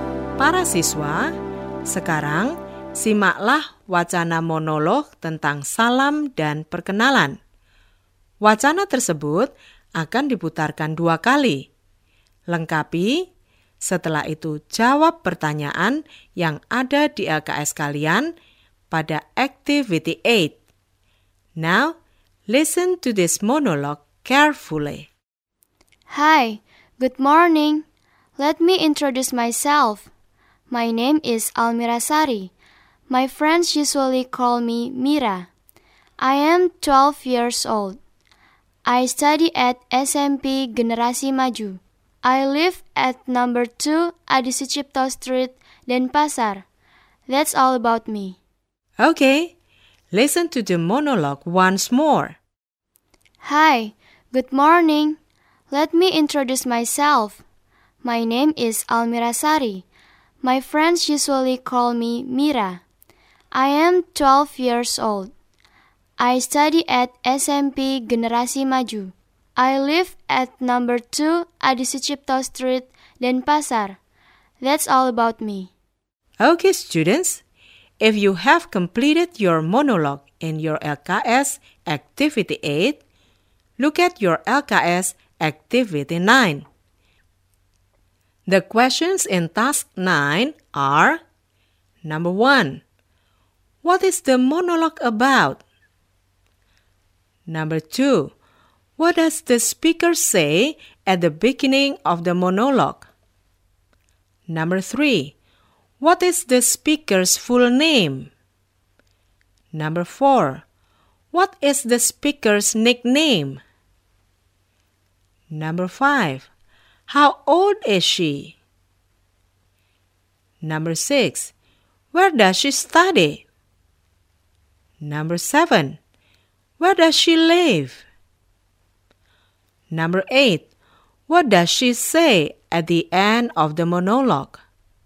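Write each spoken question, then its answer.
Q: What is the monologue about?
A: Personal introduction of Almira Sari

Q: What does the speaker say at the beginning of the monologue?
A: Hi, good morning

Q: What is the speaker's full name?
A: Almira Sari

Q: What is the speaker's nickname?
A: Mira

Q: How old is she?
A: 12 years old

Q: Where does she study?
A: SMP Generasi Maju

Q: Where does she live?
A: At number 2 Adi Sucipto Street, Denpasar

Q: What does she say at the end of the monologue?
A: That's all about me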